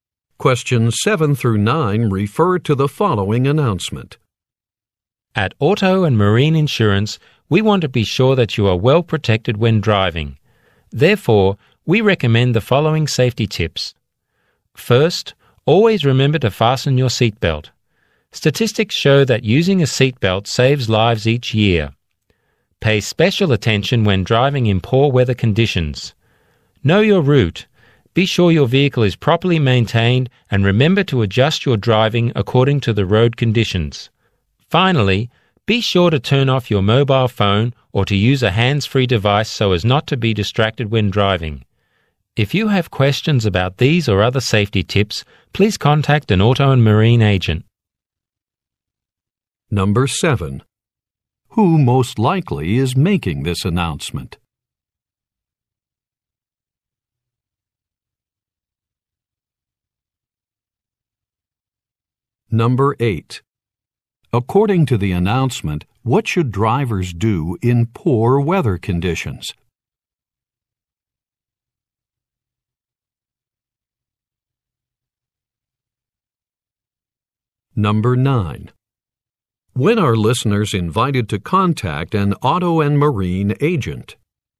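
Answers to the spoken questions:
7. An insurance company
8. Pay special attention
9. When they have questions about safety tips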